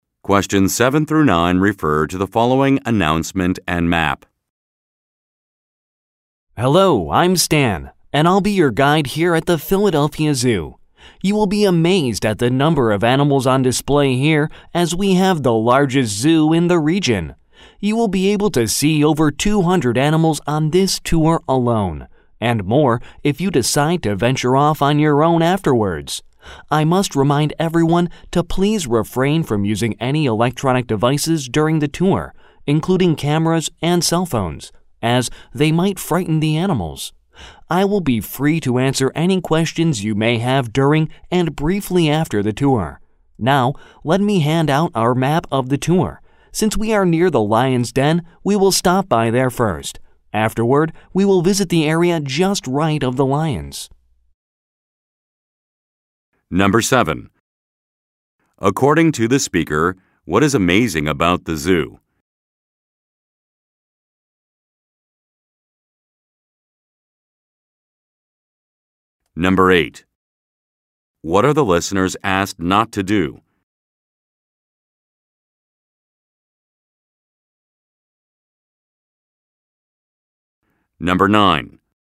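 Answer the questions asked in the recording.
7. The number of animals on display (it is the largest zoo in the region)
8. Use electronic devices, such as cameras and cell phones, during the tour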